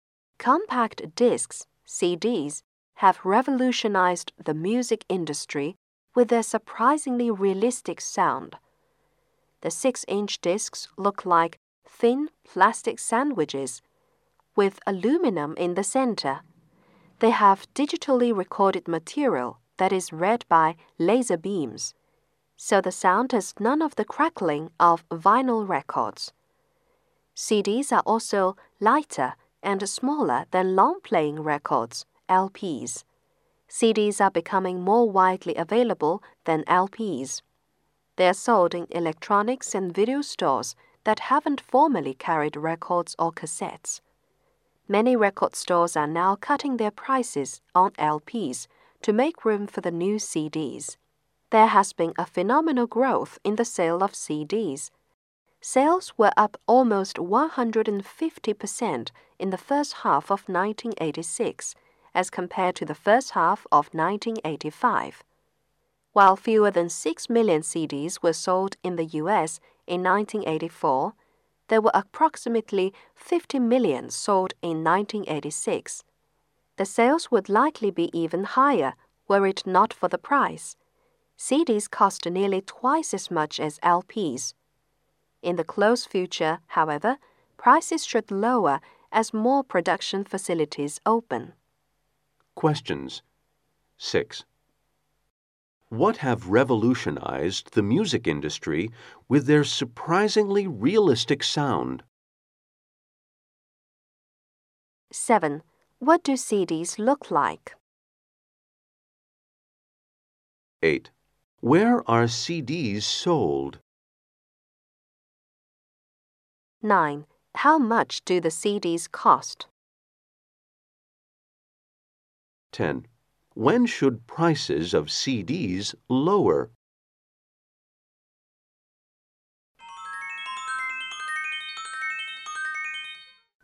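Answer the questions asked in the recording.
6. Compact discs (CDs)
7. Thin plastic sandwiches
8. In electronics and video stores
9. Nearly twice as much as LPs
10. When more production facilities open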